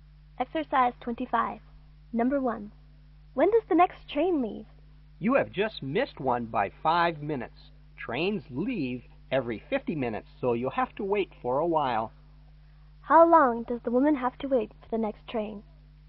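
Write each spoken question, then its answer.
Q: How long does the woman have to wait for the next train?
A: 45 minutes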